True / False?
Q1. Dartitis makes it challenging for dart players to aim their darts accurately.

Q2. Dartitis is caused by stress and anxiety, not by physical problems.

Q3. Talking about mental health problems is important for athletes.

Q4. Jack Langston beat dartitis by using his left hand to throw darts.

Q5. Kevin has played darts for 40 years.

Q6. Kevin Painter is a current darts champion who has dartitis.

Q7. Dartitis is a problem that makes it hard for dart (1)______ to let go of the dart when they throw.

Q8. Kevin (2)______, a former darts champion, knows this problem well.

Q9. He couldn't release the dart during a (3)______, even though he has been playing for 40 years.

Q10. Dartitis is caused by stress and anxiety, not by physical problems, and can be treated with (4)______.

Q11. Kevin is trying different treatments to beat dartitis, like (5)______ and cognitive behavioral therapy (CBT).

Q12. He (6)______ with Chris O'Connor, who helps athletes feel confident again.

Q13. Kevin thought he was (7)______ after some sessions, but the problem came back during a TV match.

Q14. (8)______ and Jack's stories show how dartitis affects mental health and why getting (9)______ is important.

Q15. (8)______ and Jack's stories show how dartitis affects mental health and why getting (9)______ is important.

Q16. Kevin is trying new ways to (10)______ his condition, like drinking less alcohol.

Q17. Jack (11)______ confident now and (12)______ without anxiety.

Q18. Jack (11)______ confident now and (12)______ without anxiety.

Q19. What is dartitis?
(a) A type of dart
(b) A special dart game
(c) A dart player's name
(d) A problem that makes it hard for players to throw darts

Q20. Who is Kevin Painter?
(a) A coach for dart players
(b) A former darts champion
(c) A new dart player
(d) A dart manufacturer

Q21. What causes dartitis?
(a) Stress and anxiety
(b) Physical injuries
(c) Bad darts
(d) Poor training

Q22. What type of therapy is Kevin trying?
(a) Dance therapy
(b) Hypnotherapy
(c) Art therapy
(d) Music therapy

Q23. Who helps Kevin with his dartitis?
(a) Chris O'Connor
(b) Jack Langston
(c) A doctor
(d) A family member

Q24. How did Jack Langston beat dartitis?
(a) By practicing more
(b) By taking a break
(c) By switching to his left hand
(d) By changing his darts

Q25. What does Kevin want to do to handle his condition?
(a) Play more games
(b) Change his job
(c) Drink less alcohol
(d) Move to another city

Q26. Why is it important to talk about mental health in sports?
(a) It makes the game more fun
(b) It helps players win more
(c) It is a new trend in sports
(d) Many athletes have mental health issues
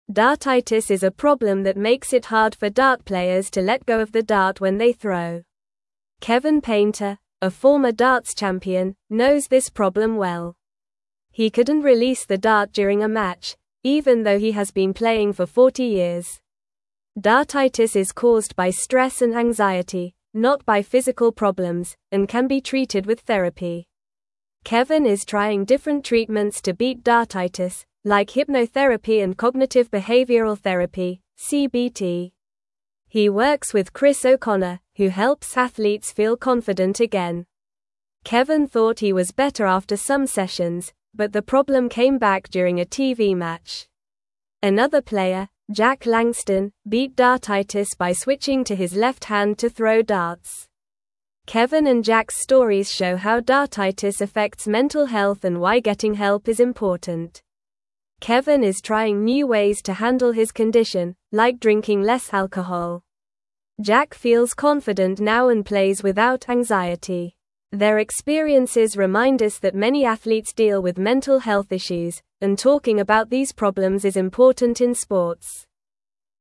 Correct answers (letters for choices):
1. False
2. True
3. True
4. True
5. True
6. False
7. players
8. Painter
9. match
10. therapy
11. hypnotherapy
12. works
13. better
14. Kevin
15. help
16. handle
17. feels
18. plays
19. d
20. b
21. a
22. b
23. a
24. c
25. c
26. d

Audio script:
Dartitis is a problem that makes it hard for dart players to let go of the dart when they throw. Kevin Painter, a former darts champion, knows this problem well. He couldn't release the dart during a match, even though he has been playing for 40 years. Dartitis is caused by stress and anxiety, not by physical problems, and can be treated with therapy.
Kevin is trying different treatments to beat dartitis, like hypnotherapy and cognitive behavioral therapy (CBT). He works with Chris O'Connor, who helps athletes feel confident again. Kevin thought he was better after some sessions, but the problem came back during a TV match. Another player, Jack Langston, beat dartitis by switching to his left hand to throw darts.
Kevin and Jack's stories show how dartitis affects mental health and why getting help is important. Kevin is trying new ways to handle his condition, like drinking less alcohol. Jack feels confident now and plays without anxiety. Their experiences remind us that many athletes deal with mental health issues, and talking about these problems is important in sports.

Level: Level 2